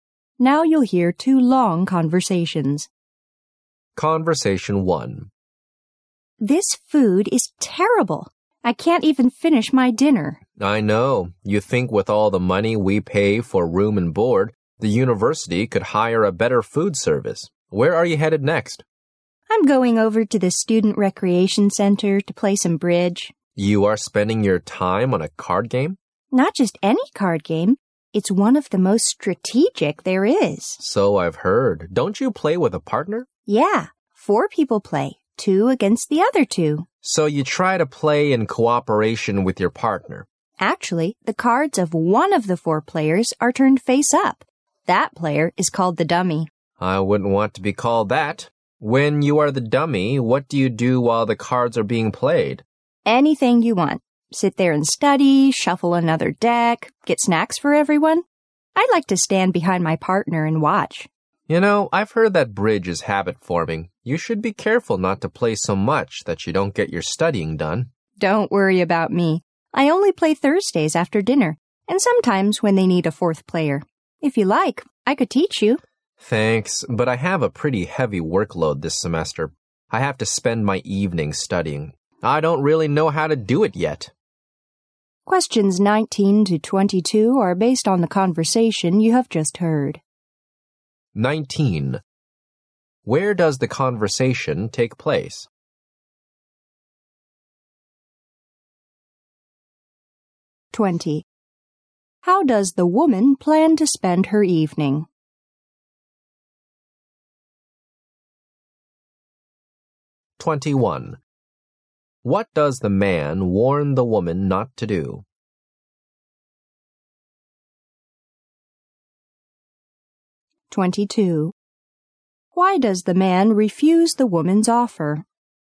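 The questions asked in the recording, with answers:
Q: How does the woman plan to spend her evening?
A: Playing bridge at the Student Recreation Center

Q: What does the man warn the woman not to do?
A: Not to play bridge so much that she neglects her studies

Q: Why does the man refuse the woman's offer?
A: He has a heavy workload and must study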